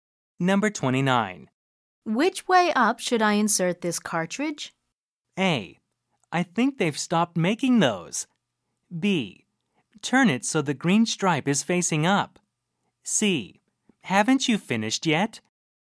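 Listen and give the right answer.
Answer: B: Turn it so the green stripe is facing up.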